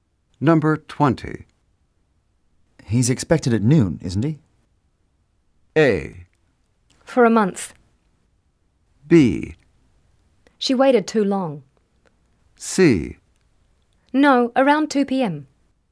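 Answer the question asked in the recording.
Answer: C: No, around 2 p.m.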